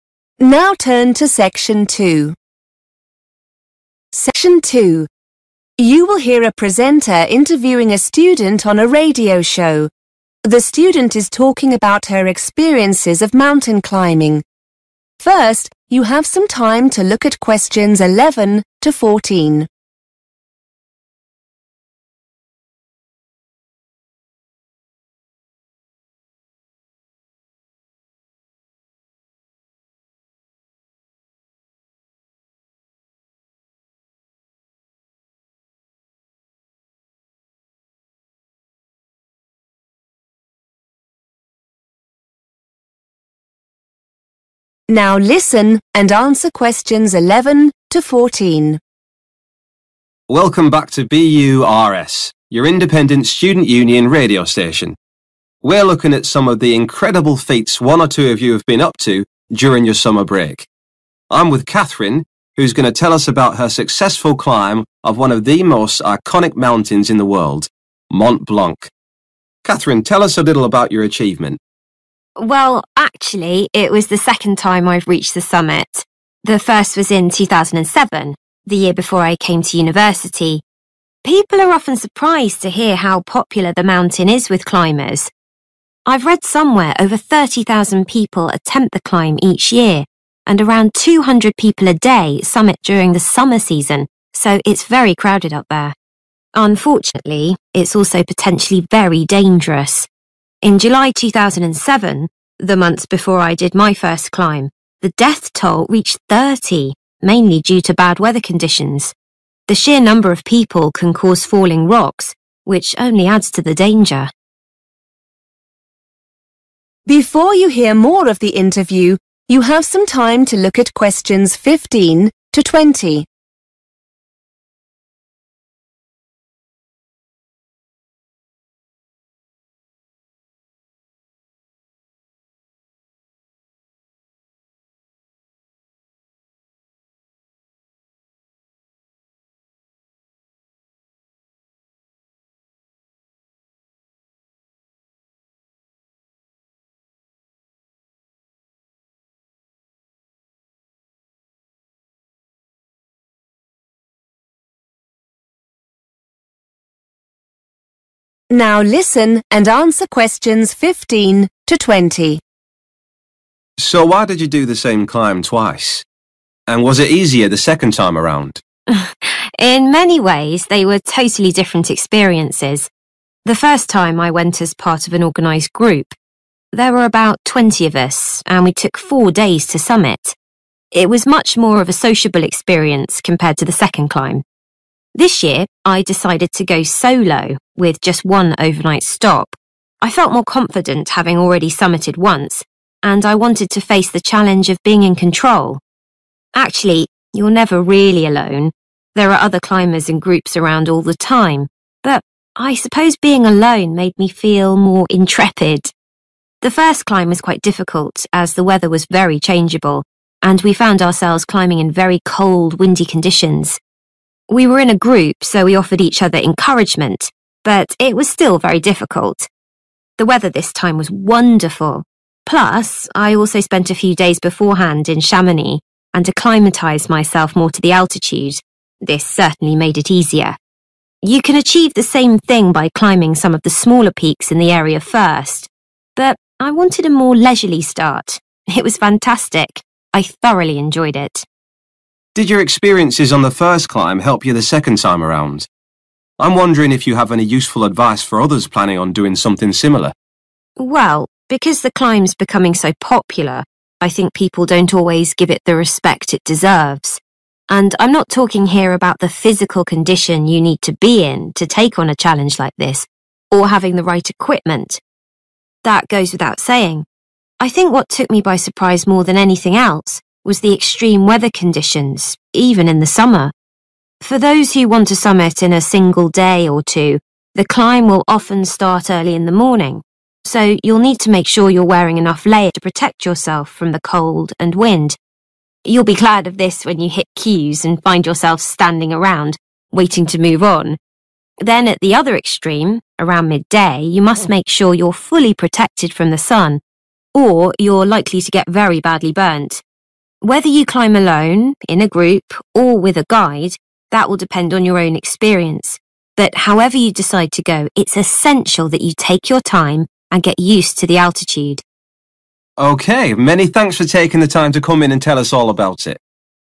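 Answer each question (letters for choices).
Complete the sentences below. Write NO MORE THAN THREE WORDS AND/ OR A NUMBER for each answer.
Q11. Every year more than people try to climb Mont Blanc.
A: 30,000

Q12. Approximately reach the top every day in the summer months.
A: 200 people

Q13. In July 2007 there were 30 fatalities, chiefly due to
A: bad weather conditions

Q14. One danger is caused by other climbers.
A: falling rocks

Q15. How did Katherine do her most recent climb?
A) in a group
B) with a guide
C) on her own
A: C

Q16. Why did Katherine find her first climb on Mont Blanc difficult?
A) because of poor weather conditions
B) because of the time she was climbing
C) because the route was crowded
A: A

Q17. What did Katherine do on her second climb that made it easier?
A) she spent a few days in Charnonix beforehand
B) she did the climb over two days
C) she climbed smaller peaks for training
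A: A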